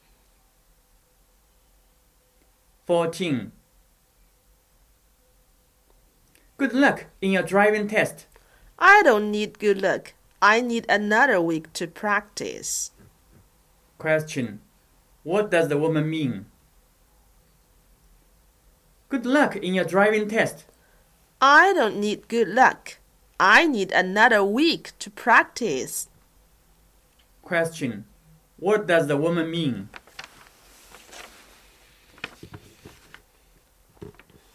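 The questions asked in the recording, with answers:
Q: What does the woman mean?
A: She needs more practice before the test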